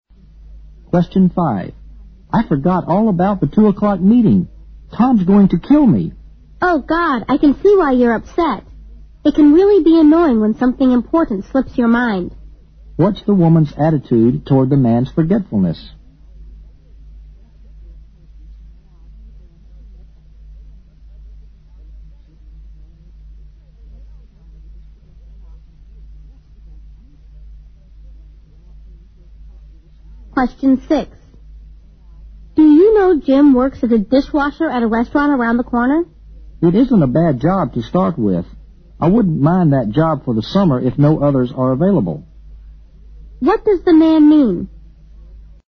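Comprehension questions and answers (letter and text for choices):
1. What's the woman's attitude towardsthe man's forgetfulness?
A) She's scornful.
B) She's angry.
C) She's sympathetic.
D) She's worried.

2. What does the man mean?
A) He likes the job of a dish-washer because it pays well.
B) He thinks it's important to have a good job from the beginning.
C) He hates to be a dish-washer becauseit's boring.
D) He would work as a dish-washer in summer if he has to.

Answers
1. C) She's sympathetic.
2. D) He would work as a dish-washer in summer if he has to.

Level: 六级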